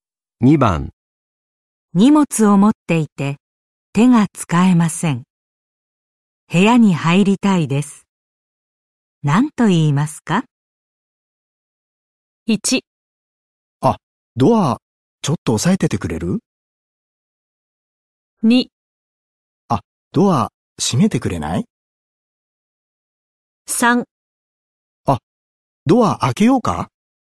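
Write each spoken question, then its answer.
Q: 何と言いますか?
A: 1: あ、ドアちょっと押さえててくれる?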